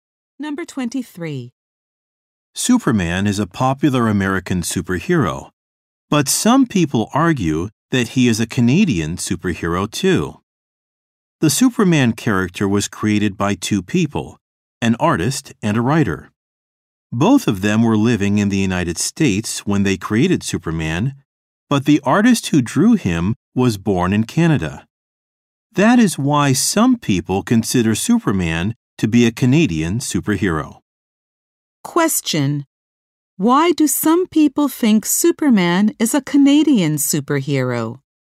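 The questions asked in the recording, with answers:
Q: Question: Why do some people think Superman is a Canadian superhero?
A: The artist who drew him was born in Canada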